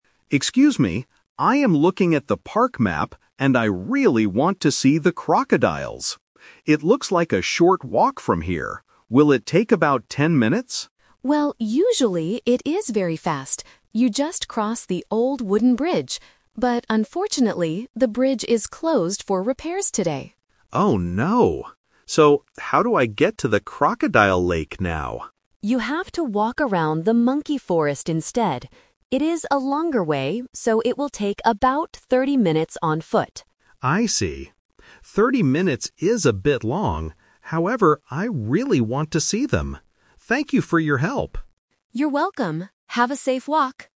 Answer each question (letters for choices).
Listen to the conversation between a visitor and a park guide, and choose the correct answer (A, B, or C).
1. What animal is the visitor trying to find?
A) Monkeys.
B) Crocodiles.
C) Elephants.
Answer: B

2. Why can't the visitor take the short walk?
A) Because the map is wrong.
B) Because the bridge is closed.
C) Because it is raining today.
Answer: B

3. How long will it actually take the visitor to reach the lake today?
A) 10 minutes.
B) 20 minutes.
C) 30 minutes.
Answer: C

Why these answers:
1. The visitor clearly states, "I really want to see the crocodiles." Option (A) is the trap; the guide mentions the "monkey forest" as part of the new route, but the visitor is not looking for monkeys. Option (C) is not mentioned.
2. The guide explains that the short way requires crossing the bridge, "But unfortunately, the bridge is closed for repairs today." Options (A) and (C) are plausible in real life but are not mentioned in the audio.
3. The guide gives the final information: "it will take about 30 minutes on foot." Option (A) is the trap; 10 minutes was the visitor's guess at the beginning before they knew the bridge was closed (The Twist). Option (B) is not mentioned.

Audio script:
Visitor: Excuse me. I am looking at the park map, and I really want to see the crocodiles. It looks like a short walk from here. Will it take about 10 minutes?
Guide: Well, usually it is very fast. You just cross the old wooden bridge. But unfortunately, the bridge is closed for repairs today.
Visitor: Oh no. So, how do I get to the crocodile lake now?
Guide: You have to walk around the monkey forest instead. It is a longer way, so it will take about 30 minutes on foot.
Visitor: I see. 30 minutes is a bit long, however, I really want to see them. Thank you for your help!